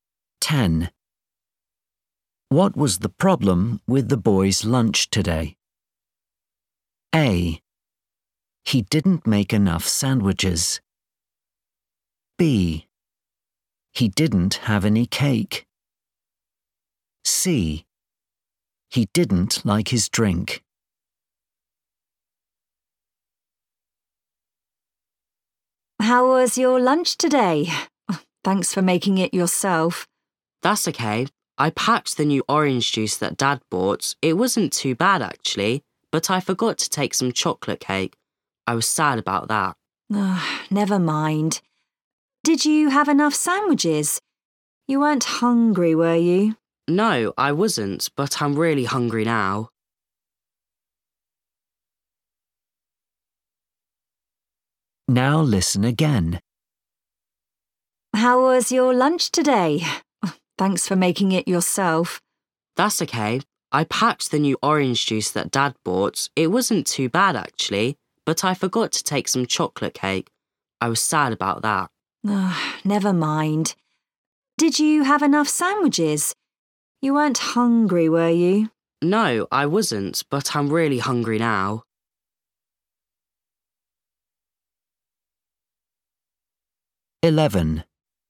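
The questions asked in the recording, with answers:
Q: What was the problem with the boy's lunch today?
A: B: He didn't have any cake.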